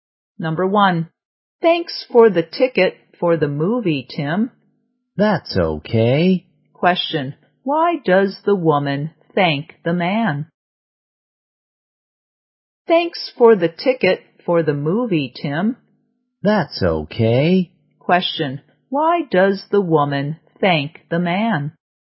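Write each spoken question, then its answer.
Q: Question, why does the woman thank the man?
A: For the movie ticket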